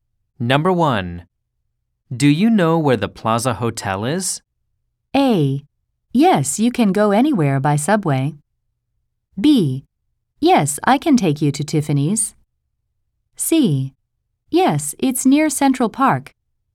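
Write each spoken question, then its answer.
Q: Do you know where the Plaza Hotel is?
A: C: Yes, it's near Central Park.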